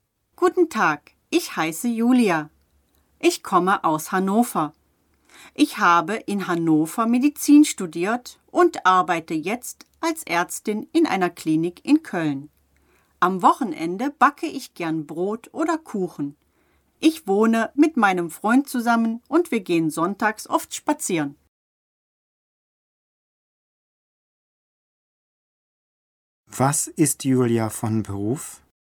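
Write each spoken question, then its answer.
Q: Was ist Julia von Beruf?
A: Ärztin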